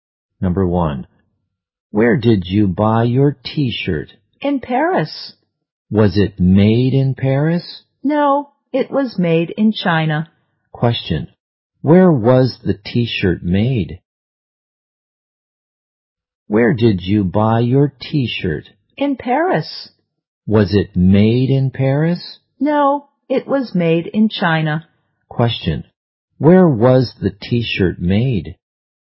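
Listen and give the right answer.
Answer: In China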